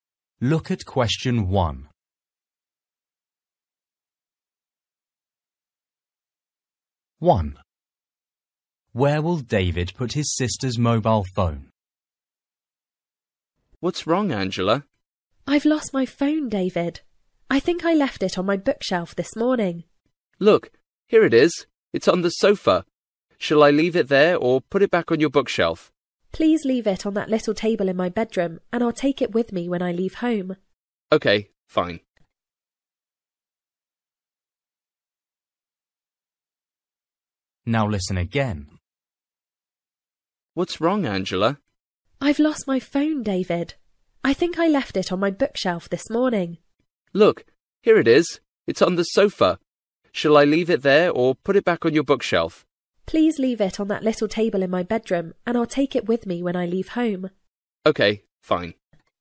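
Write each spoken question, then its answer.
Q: Where will David put his sister's mobile phone?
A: On the little table in her bedroom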